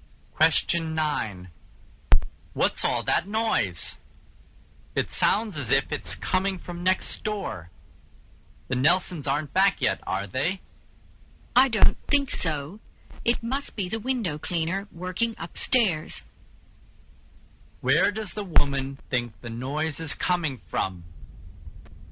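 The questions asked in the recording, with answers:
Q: Where does the woman think the noise is coming from?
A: From upstairs, where the window cleaner is working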